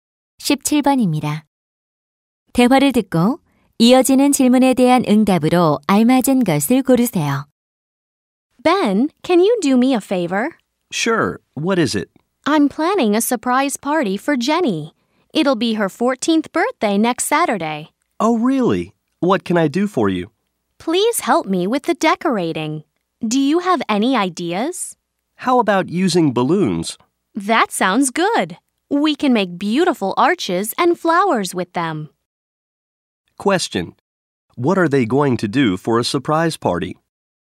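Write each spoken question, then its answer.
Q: Question. What are they going to do for a surprise party?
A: Decorate with balloons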